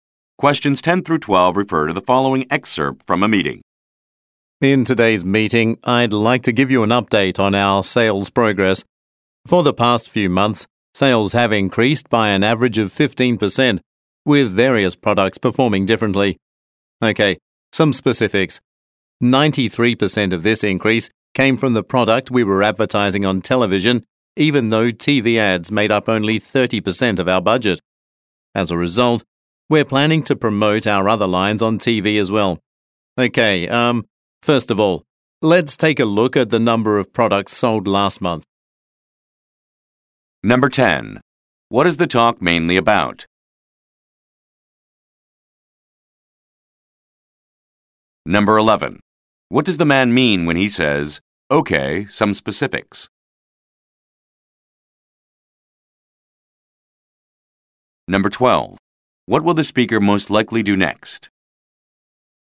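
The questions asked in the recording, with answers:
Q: What is the talk mainly about?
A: An update on sales progress

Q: What will the speaker most likely do next?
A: Look at the number of products sold last month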